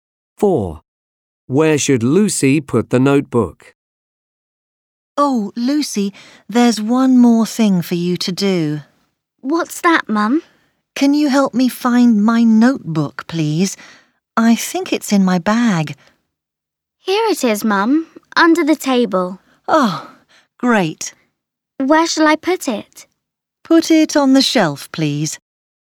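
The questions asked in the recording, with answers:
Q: Where should Lucy put the notebook?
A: On the shelf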